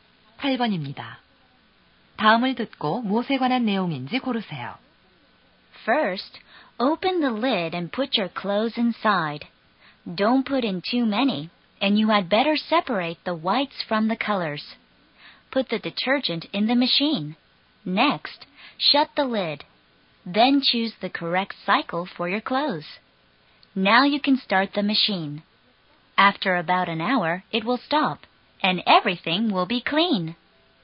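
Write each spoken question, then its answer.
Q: 다음을 듣고 무엇에 관한 내용인지 고르세요.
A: 세탁기 사용법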